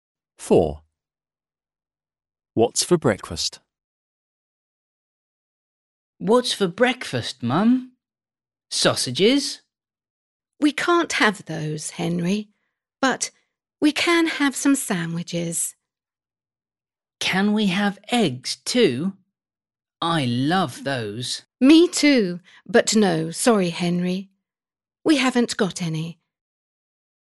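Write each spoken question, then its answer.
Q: What's for breakfast?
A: sandwiches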